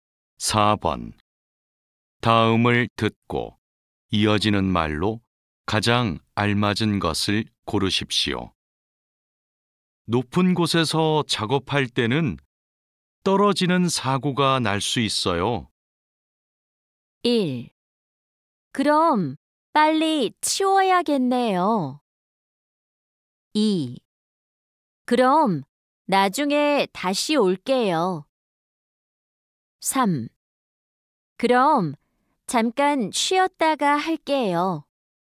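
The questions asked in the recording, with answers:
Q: 높은 곳에서 작업할 때는 떨어지는 사고가 날 수 있어요.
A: 4: 그럼 보호구를 착용해야겠네요.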